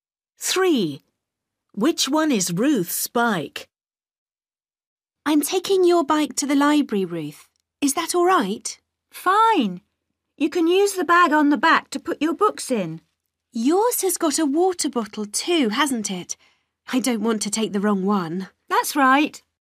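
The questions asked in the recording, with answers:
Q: Which one is Ruth's bike?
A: the one with a bag on the back and a water bottle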